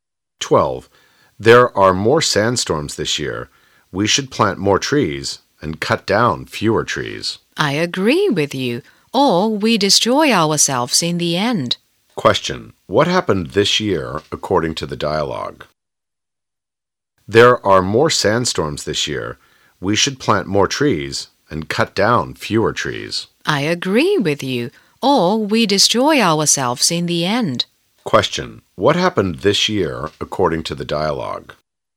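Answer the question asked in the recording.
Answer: There were more sandstorms.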